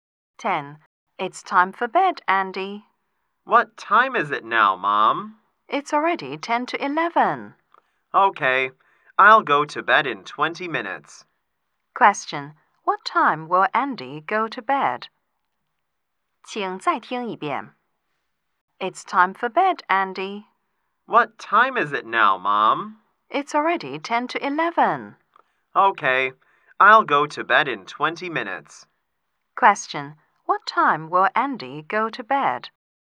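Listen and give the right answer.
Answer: At 11:10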